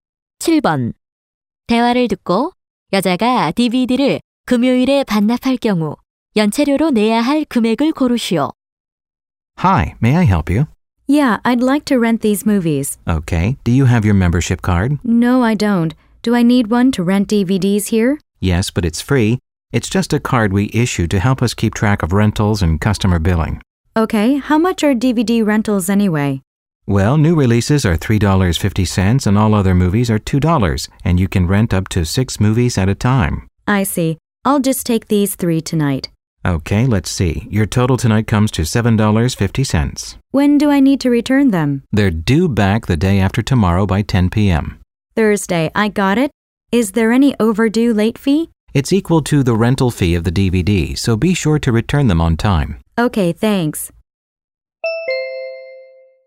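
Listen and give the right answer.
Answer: 7.50달러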